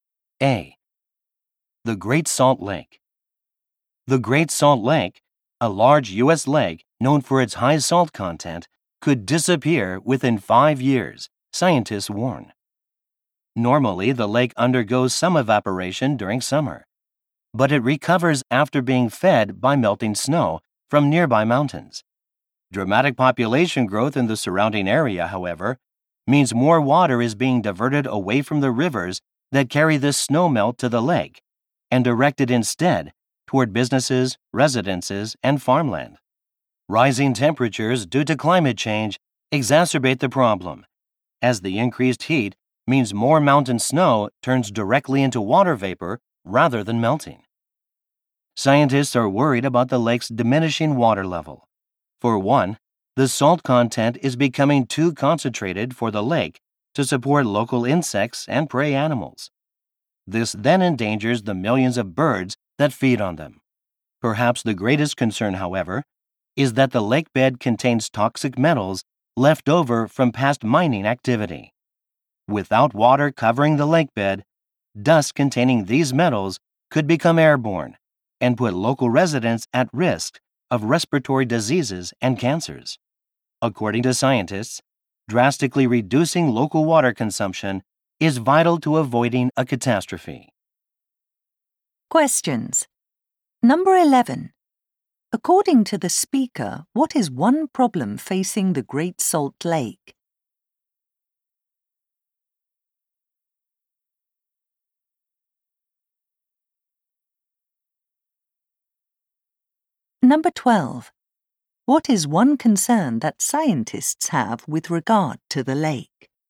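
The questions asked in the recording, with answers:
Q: According to the speaker, what is one problem facing the Great Salt Lake?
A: More water is being diverted away from the rivers that feed it because of population growth, so it could disappear.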